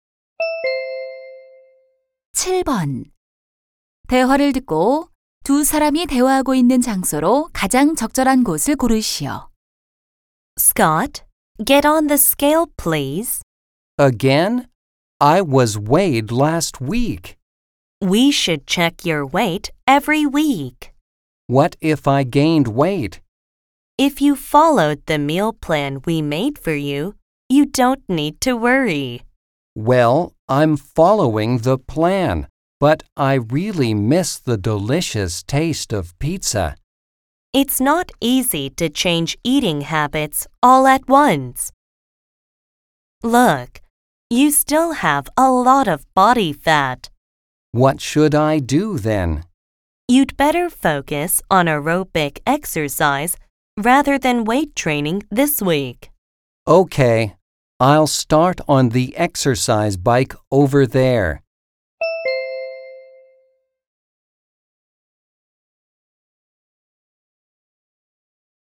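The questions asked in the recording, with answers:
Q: 대화를 듣고 두 사람이 대화하고 있는 장소로 가장 적절한 곳을 고르시오.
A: 헬스클럽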